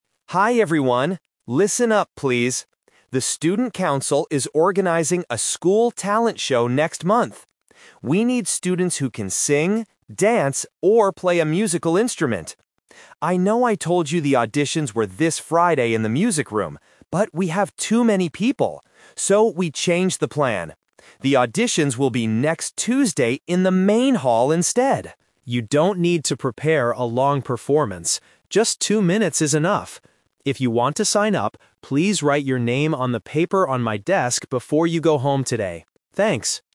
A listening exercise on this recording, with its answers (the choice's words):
Listen to a student making an announcement to the class. Choose the correct answer (A, B, or C) for each question.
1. What is the announcement about?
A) A school talent show.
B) A new sports competition.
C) A school music club.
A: A school talent show.

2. When are the auditions going to happen?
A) This Friday.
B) Next Tuesday.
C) Next month.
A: Next Tuesday.

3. How can students sign up for the auditions?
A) By sending an email to the school.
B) By talking to the music teacher.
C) By writing their name on a piece of paper.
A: By writing their name on a piece of paper.

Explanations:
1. The speaker clearly says, "The Student Council is organizing a School Talent Show..." Option (C) is a trap because music and singing are mentioned, but it is a talent show, not a club. Option (B) is a plausible school event but is never mentioned.
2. The student announces the new plan: "The auditions will be next Tuesday in the main hall instead." Option (A) is the A2 Twist/Trap; Friday was the old plan, but it changed because there were too many people. Option (C) is a trap because "next month" is when the actual show happens, not the auditions.
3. At the end, the student says, "...please write your name on the paper on my desk..." Options (A) and (B) are logical ways to sign up for school activities in real life, but they are not mentioned in the audio.

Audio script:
Student: Hi everyone! Listen up, please. The Student Council is organizing a School Talent Show next month. We need students who can sing, dance, or play a musical instrument. I know I told you the auditions were this Friday in the music room. But, we have too many people! So, we changed the plan. The auditions will be next Tuesday in the main hall instead. You don't need to prepare a long performance. Just two minutes is enough. If you want to sign up, please write your name on the paper on my desk before you go home today. Thanks!